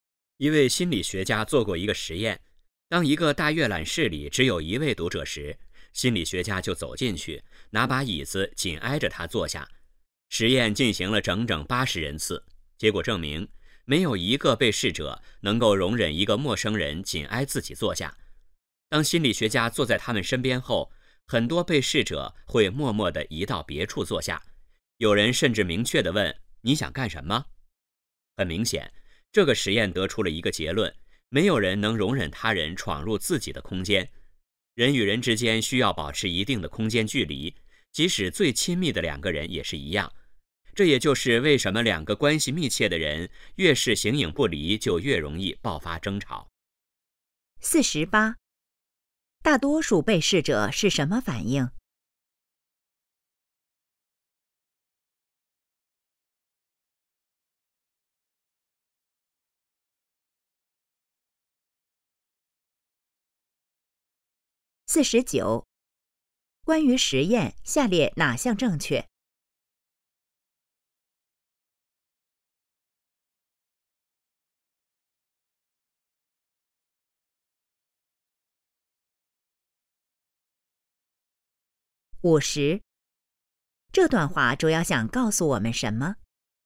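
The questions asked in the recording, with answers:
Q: 大多数被试者是什么反应?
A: 默默地移到别处坐下

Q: 这段话主要想告诉我们什么?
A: 人与人之间需要保持一定的空间距离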